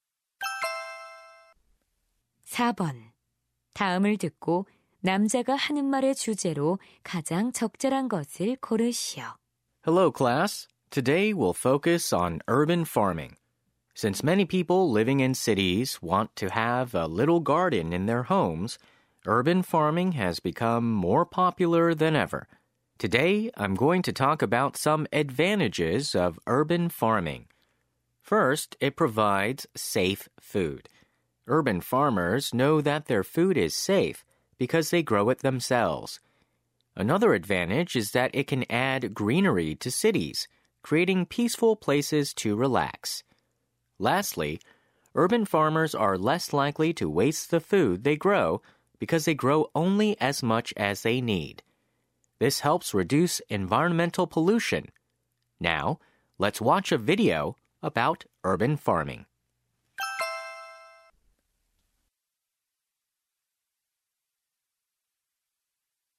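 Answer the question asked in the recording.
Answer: 도시 농업의 장점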